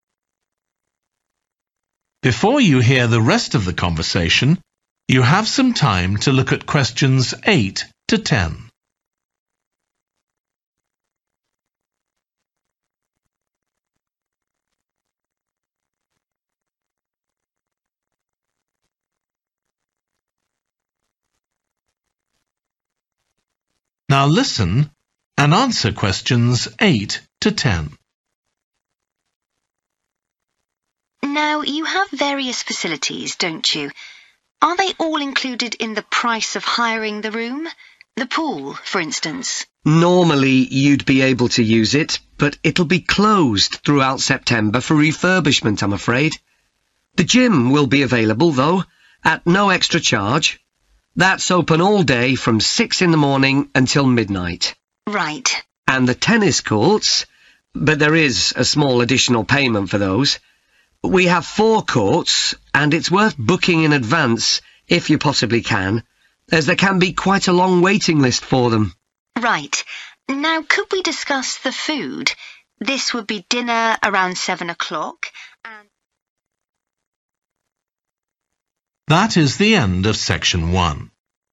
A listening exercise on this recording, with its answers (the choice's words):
Choose THREE answers from the box and write the correct letter, A, B or C, next to Questions.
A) included in cost of hiring room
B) available at extra charge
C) not available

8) outdoor swimming pool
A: not available

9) gym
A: included in cost of hiring room

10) tennis courts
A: available at extra charge

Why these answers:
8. The correct answer is C because the excerpt clearly states that the outdoor swimming pool will be closed, indicating that it is not available for use during that period.
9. The correct answer is 'A' because the excerpt clearly states that the gym will be available at no extra charge, indicating that it is included in the cost of hiring a room.
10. The correct answer is 'B' because the excerpt clearly states that there is an additional cost involved in using the tennis courts, aligning with option B which specifies 'available at extra charge'.

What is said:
They each sleep two to four people and have their own living room, bathroom and small kitchen.
SAM: That sounds perfect for what we'll need.
SAM: Now you have various facilities, don't you? Are they all included in the price of hiring the room? The pool, for instance.
ANDREW: Normally you'd be able to use it, but it'll be closed throughout September for refurbishment, I'm afraid. The gym will be available, though, at no extra charge. That's open all day, from six in the morning until midnight.
SAM: Right.
ANDREW: And the tennis courts, but there is a small additional payment for those. We have four courts, and it's worth booking in advance if you possibly can, as there can be quite a long waiting list for them!
SAM: Right. Now could we discuss the food? This would be dinner, around seven o'clock ...